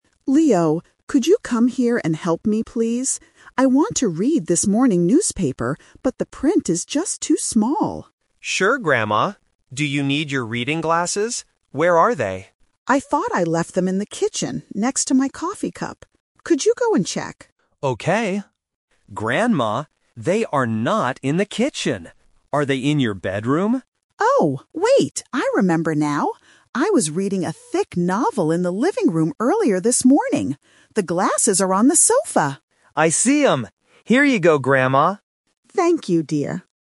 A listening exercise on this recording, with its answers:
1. What does the grandmother want to read right now?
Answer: A morning newspaper

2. Where did the grandmother think her glasses were at first?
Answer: In the kitchen

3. Where are the reading glasses actually located?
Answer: On the sofa

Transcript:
Grandma: Leo, could you come here and help me, please? I want to read this morning newspaper, but the print is just too small.
Leo: Sure, Grandma. Do you need your reading glasses? Where are they?
Grandma: I thought I left them in the kitchen, next to my coffee cup. Could you go and check?
Leo: Okay... [pause] Grandma, they are not in the kitchen. Are they in your bedroom?
Grandma: Oh, wait! I remember now. I was reading a thick novel in the living room earlier this morning. The glasses are on the sofa!